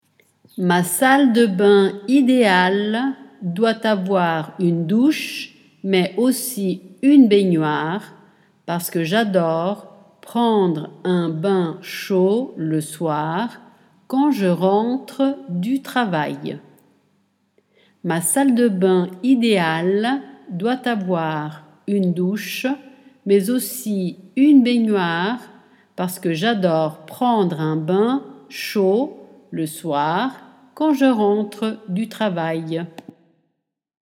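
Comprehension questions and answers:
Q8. Ma doit avoir parce que quand .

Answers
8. salle de bain idéale / une douche, mais aussi une baignoire, / j'adore prendre un bain chaud le soir / je rentre du travail

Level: A2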